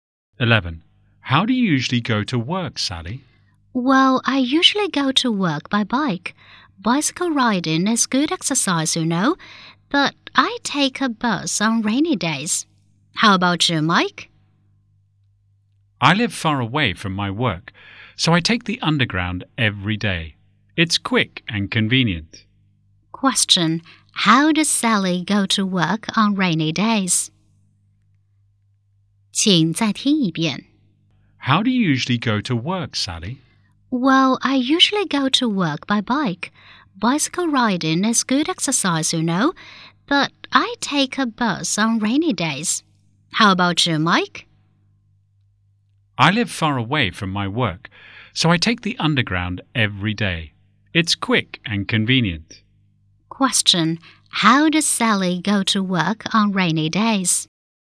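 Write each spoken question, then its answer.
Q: how does Sally go to work on rainy days?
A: By bus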